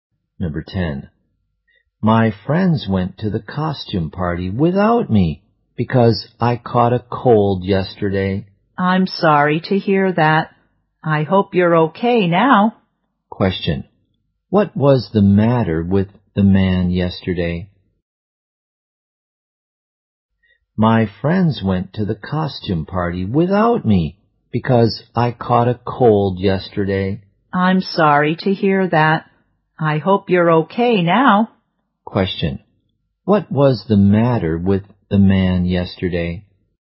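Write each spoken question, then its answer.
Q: what was the matter with the man yesterday?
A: He caught a cold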